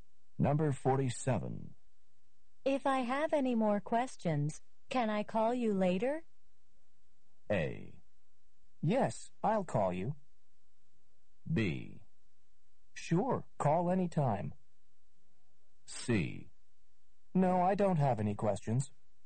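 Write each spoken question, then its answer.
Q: If I have any more questions, can I call you later?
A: B: Sure, call anytime.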